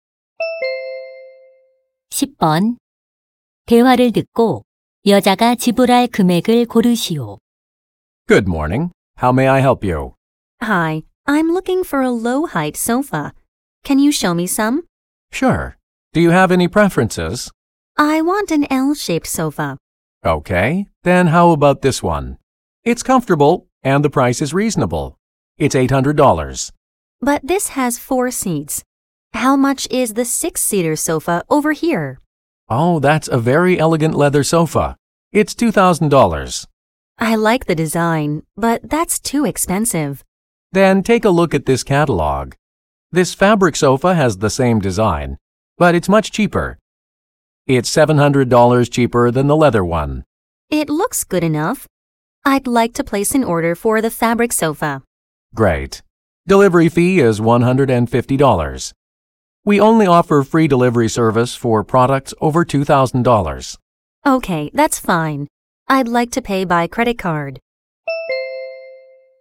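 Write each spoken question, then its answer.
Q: 대화를 듣고 여자가 지불할 금액을 고르시오.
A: $1,450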